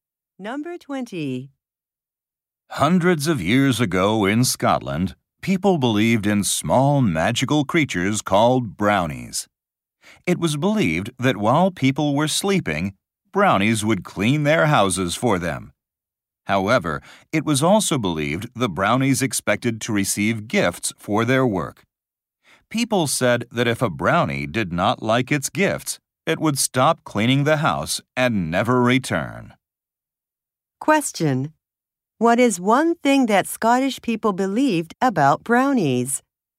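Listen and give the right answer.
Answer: They expected gifts for cleaning houses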